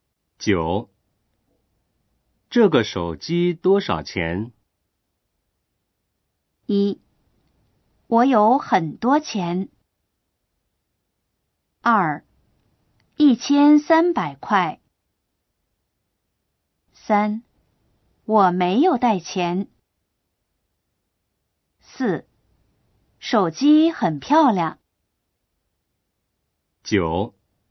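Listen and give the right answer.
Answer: 2: 一千三百块。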